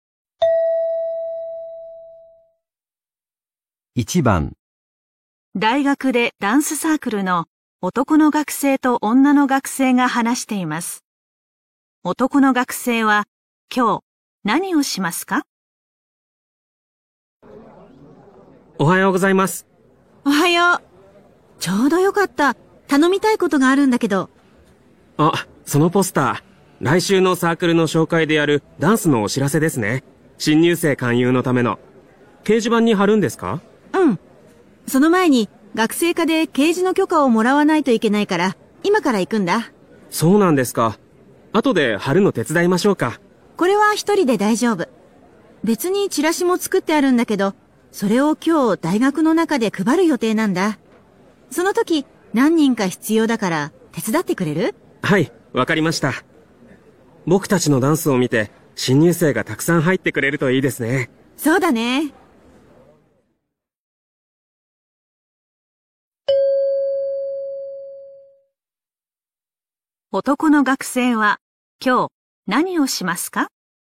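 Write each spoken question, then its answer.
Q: 男の学生は今日何をしますか?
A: 大学の中でチラシを配るのを手伝う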